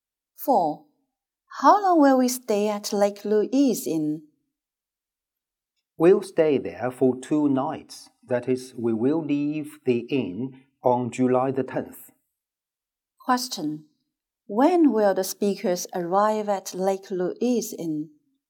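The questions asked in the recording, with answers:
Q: When will the speakers arrive at Lake Louise Inn?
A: On July 8th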